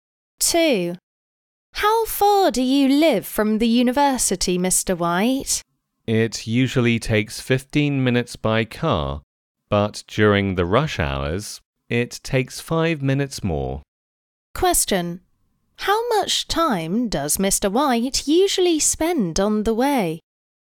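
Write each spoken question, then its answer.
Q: How much time does Mr.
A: 15 minutes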